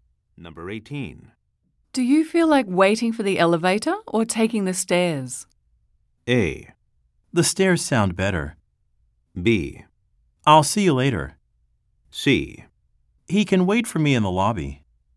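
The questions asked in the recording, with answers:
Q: Do you feel like waiting for the elevator or taking the stairs?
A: A: The stairs sound better.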